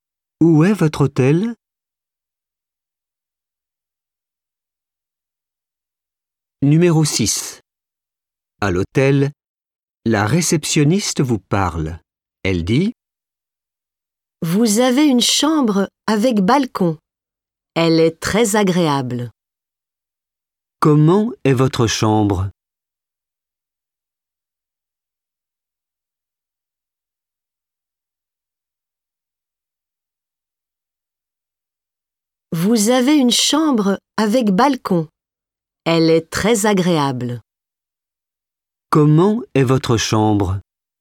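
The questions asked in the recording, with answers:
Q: « Comment est votre chambre ? »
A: Avec balcon, très agréable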